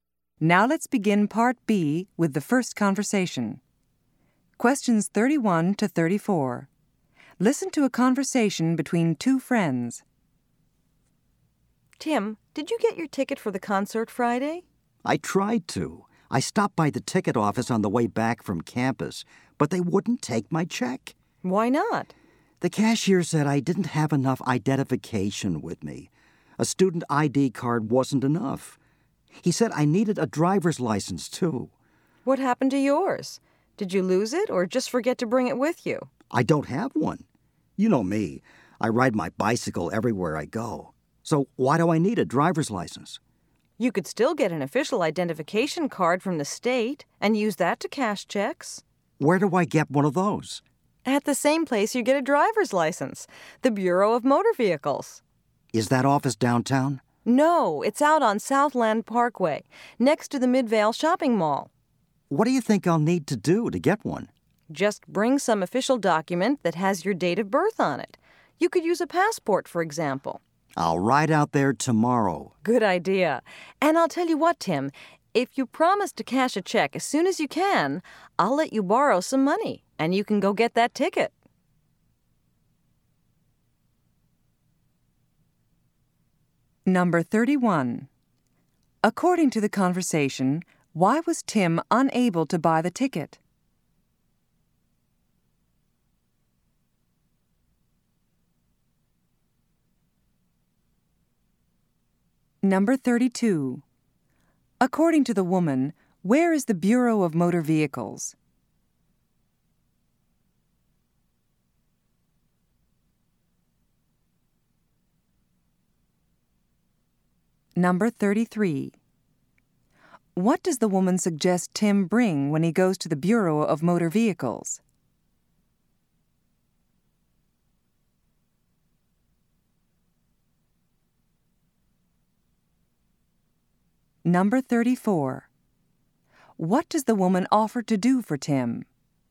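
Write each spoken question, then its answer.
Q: According to the conversation, why was Tim unable to buy the ticket?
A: He didn't have enough identification to pay by check.

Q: According to the woman, where is the Bureau of Motor Vehicles?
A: On Southland Parkway, next to the Midvale Shopping Mall

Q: What does the woman suggest Tim bring when he goes to the Bureau of Motor Vehicles?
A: An official document with his date of birth, such as a passport

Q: What does the woman offer to do for Tim?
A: Lend him money to buy the ticket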